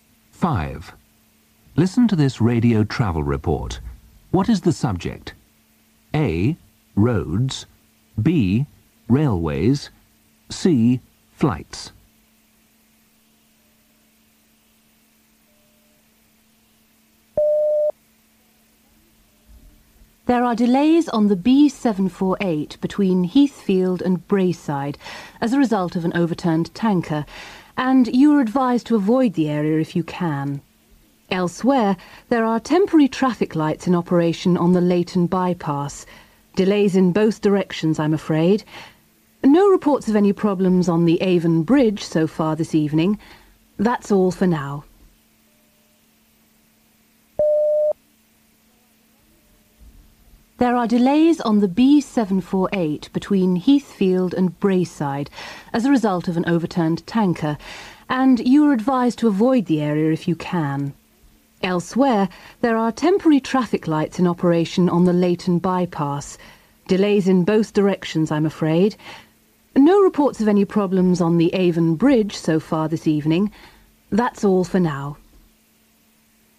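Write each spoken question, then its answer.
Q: What is the subject?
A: A: Roads.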